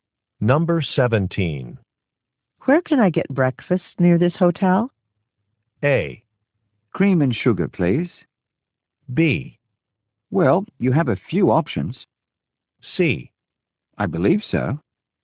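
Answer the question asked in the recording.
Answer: B: Well, you have a few options.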